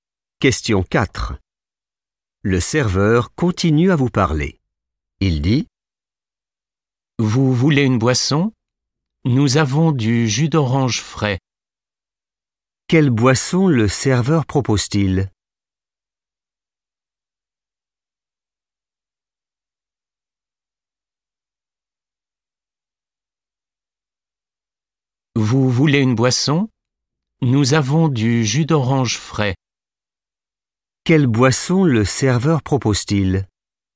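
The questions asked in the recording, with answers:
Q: Quelle boisson le serveur propose-t-il?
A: du jus d'orange frais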